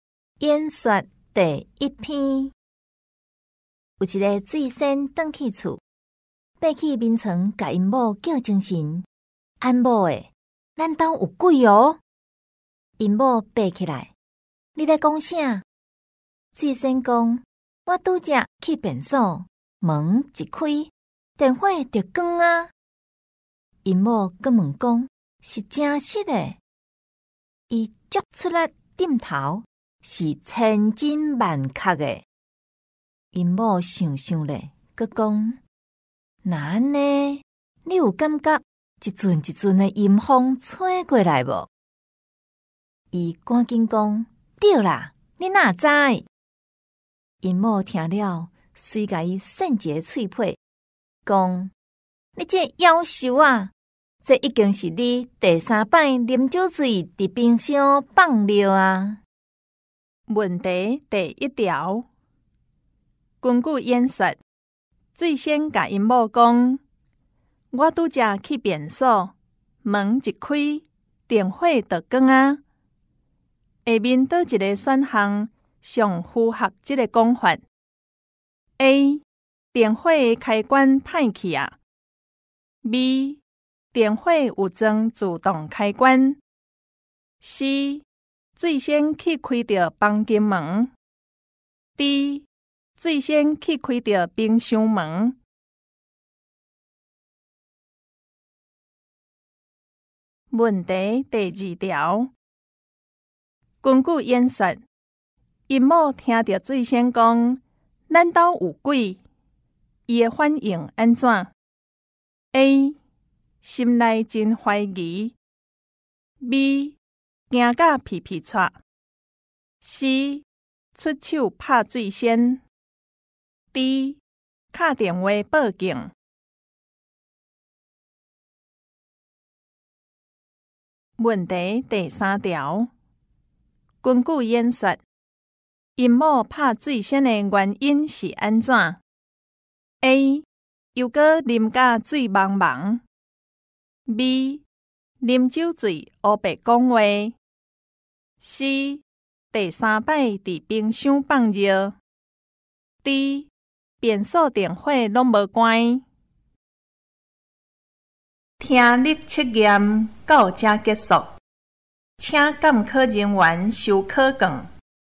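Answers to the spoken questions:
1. D: 最先去开到冰箱门
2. A: 心内真怀疑
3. C: 第三摆伫冰箱放尿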